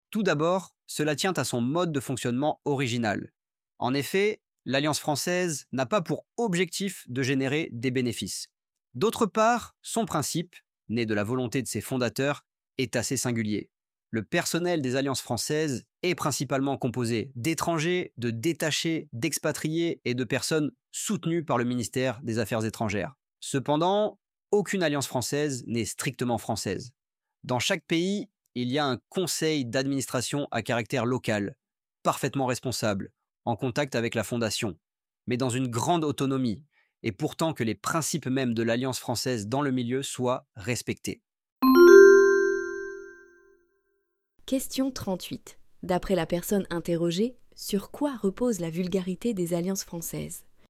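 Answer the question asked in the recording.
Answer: Sur son mode de fonctionnement original : elle ne cherche pas de bénéfices, et chaque Alliance a un conseil d'administration local autonome.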